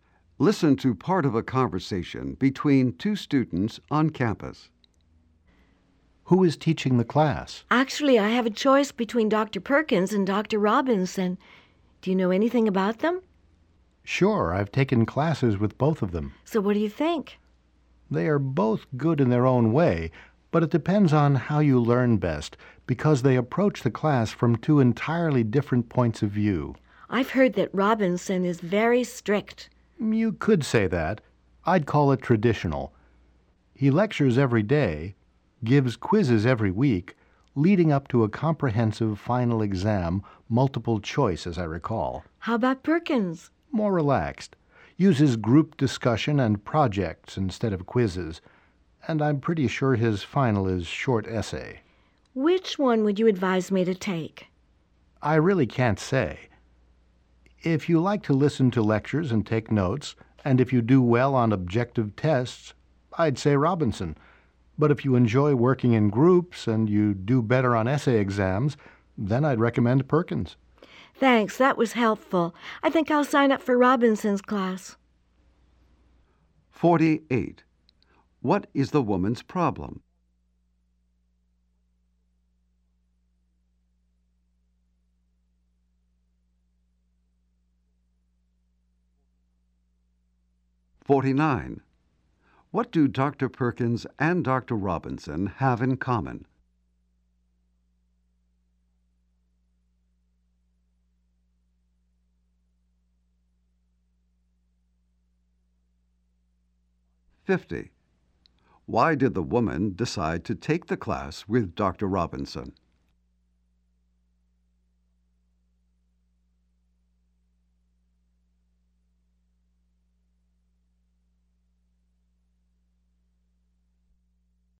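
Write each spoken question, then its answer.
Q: What is the woman's problem?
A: She must choose between Dr. Perkins and Dr. Robinson.

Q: Robinson have in common?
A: They are both good teachers.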